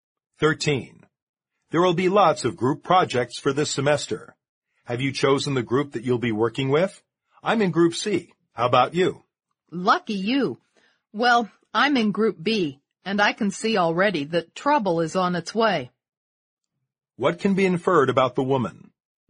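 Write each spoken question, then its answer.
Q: What can be inferred about the woman?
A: She expects problems with her group, Group B.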